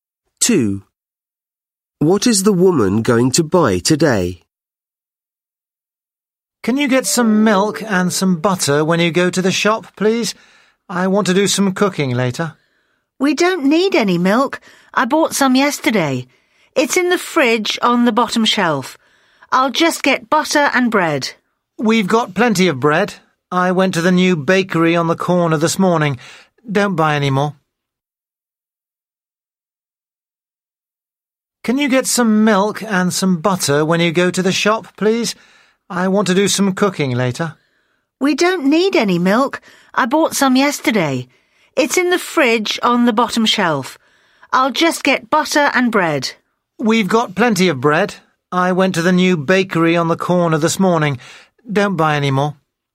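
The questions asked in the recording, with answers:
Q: What is the woman going to buy today?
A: Butter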